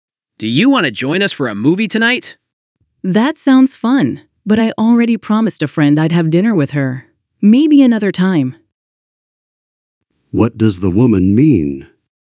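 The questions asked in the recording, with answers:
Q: What does the woman mean?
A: She can't go to the movie tonight because she has dinner plans with a friend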